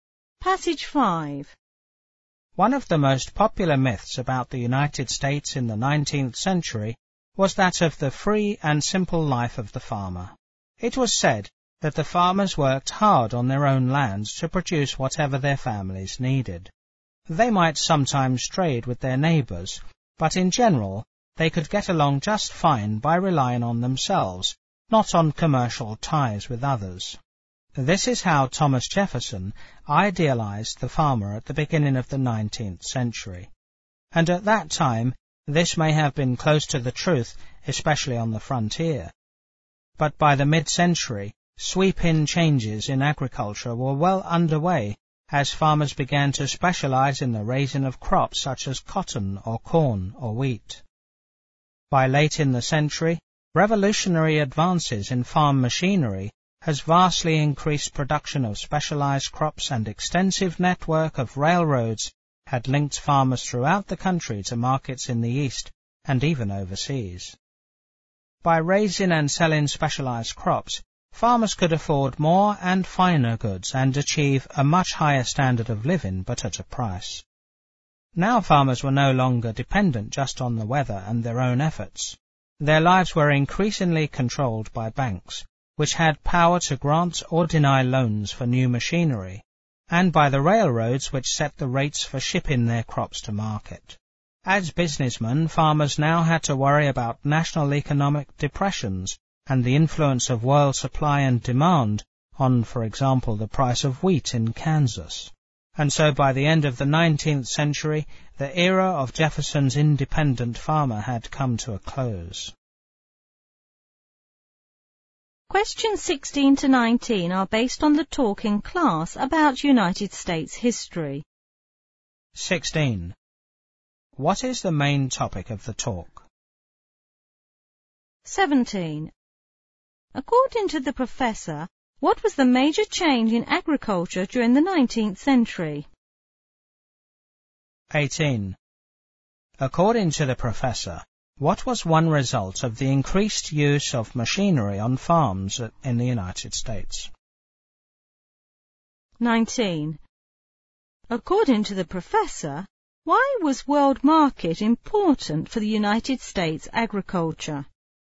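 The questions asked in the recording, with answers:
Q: What is the main topic of the talk?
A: The end of the independent farmer in 19th-century United States

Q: According to the professor, what was the major change in agriculture during the 19th century?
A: Farmers began to specialize in raising crops such as cotton, corn or wheat

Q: According to the professor, what was one result of the increased use of machinery on farms in the United States?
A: Production of specialized crops vastly increased

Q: According to the professor, why was world market important for the United States agriculture?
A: World supply and demand influenced crop prices, such as the price of wheat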